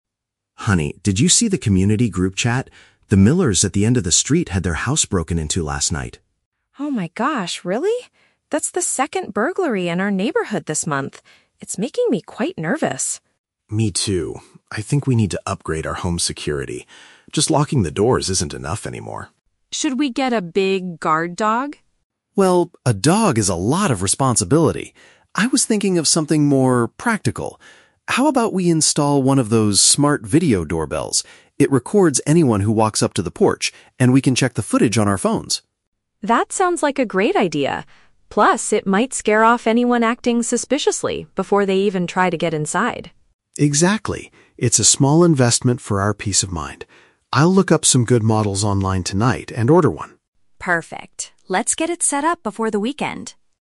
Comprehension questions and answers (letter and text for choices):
Listen to the conversation between a husband and wife and choose the correct answer (A, B, or C) for each question.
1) Why is Chloe feeling nervous?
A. Because she saw a stranger standing near her house.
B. Because some homes in their area have been robbed.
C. Because her community group chat was hacked.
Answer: B. Because some homes in their area have been robbed.

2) What is Mike's opinion on getting a guard dog?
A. He thinks it is the best way to scare off thieves.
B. He feels it requires too much work to care for.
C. He believes it is too expensive to feed every day.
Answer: B. He feels it requires too much work to care for.

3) What do they finally agree to do?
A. Buy a digital security device for their front entrance.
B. Go to the local electronic store this weekend.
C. Ask the Millers for advice on home safety.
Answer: A. Buy a digital security device for their front entrance.

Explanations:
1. Mike says the Millers' house was "broken into," and Chloe mentions it is the "second burglary in our neighborhood." A burglary or break-in means a house was robbed. The Trap (C): Mike mentions the "community group chat" at the beginning, but nobody hacked it; he just read the bad news there. Plausible but not mentioned (A): Seeing a stranger would make anyone nervous, but Chloe didn't see anyone. She is just reacting to the news.
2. When Chloe suggests a dog, Mike says, "a dog is a lot of responsibility." This means taking care of a dog is a lot of work. The Trap (A): The phrase "scare off" is mentioned later in the audio, but it is used to describe what the camera can do, not the dog. Plausible but not mentioned (C): Keeping a big dog can be expensive, but Mike does not mention the cost of food.
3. Mike suggests they install a "smart video doorbell" that records people on the "porch" (front entrance). A smart video doorbell is a digital security device. The Trap (B): Chloe mentions the "weekend" at the end, but Mike says he will look up models "online tonight". They are not going to a physical store. Plausible but not mentioned (C): The Millers are their neighbors who got robbed, but Mike and Chloe do not talk about asking them for advice.

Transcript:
Mike: Honey, did you see the community group chat? The Millers at the end of the street had their house broken into last night.
Chloe: Oh my gosh, really? That's the second burglary in our neighborhood this month. It's making me quite nervous.
Mike: Me too. I think we need to upgrade our home security. Just locking the doors isn't enough anymore.
Chloe: Should we get a big guard dog?
Mike: Well, a dog is a lot of responsibility. I was thinking of something more practical. How about we install one of those smart video doorbells? It records anyone who walks up to the porch, and we can check the footage on our phones.
Chloe: That sounds like a great idea. Plus, it might scare off anyone acting suspiciously before they even try to get inside.
Mike: Exactly. It's a small investment for our peace of mind. I'll look up some good models online tonight and order one.